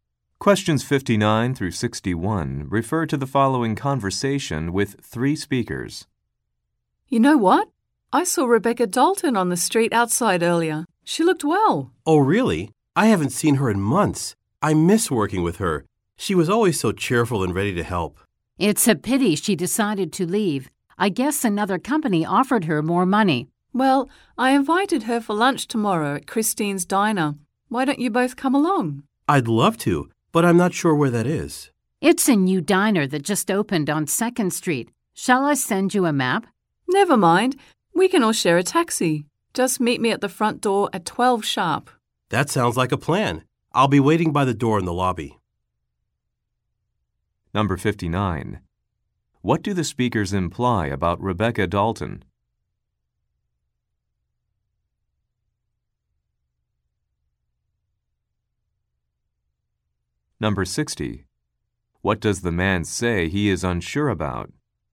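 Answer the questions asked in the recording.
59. She left for another company
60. Where the diner is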